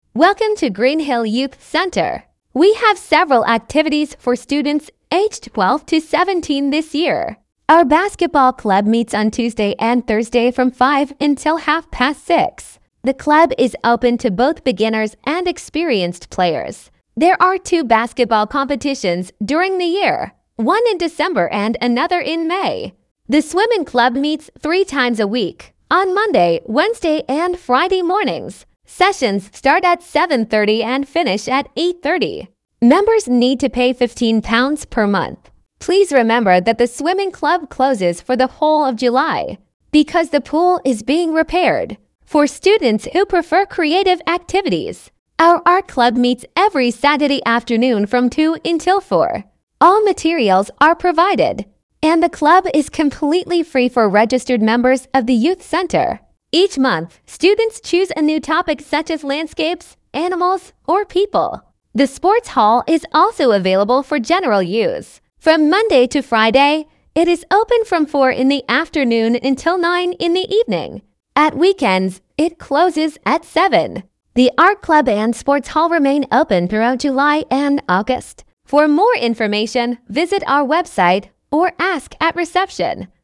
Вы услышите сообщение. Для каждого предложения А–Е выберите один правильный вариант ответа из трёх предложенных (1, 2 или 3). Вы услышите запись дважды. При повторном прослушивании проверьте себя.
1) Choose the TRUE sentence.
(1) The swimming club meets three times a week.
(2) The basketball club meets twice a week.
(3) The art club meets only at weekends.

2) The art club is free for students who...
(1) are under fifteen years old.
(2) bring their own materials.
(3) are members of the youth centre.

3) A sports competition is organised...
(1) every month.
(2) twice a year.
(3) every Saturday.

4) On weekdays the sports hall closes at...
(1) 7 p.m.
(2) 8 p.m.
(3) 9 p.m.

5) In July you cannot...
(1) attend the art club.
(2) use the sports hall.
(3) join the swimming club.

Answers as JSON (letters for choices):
{"1": "1", "2": "3", "3": "2", "4": "3", "5": "3"}

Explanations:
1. В сообщении говорится, что плавательный клуб занимается три раза в неделю — по понедельникам, средам и пятницам.
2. Художественный кружок бесплатен для зарегистрированных участников молодёжного центра.
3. Баскетбольные соревнования проходят два раза в год — в декабре и мае.
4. В будние дни спортивный зал работает до 21:00.
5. Весь июль бассейн закрыт на ремонт, поэтому посещать плавательный клуб невозможно.

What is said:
We have several activities for students aged twelve to seventeen this year.
Our basketball club meets on Tuesday and Thursday from five until half past six. The club is open to both beginners and experienced players. There are two basketball competitions during the year, one in December and another in May.
The swimming club meets three times a week, on Monday, Wednesday and Friday mornings. Sessions start at seven thirty and finish at eight thirty. Members need to pay fifteen pounds per month. Please remember that the swimming club closes for the whole of July because the pool is being repaired.
For students who prefer creative activities, our art club meets every Saturday afternoon from two until four. All materials are provided, and the club is completely free for registered members of the youth centre. Each month, students choose a new topic such as landscapes, animals or people.
The sports hall is also available for general use. From Monday to Friday, it is open from four in the afternoon until nine in the evening. At weekends, it closes at seven.
The art club and sports hall remain open throughout July and August.
For more information, visit our website or ask at reception.

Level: 8 класс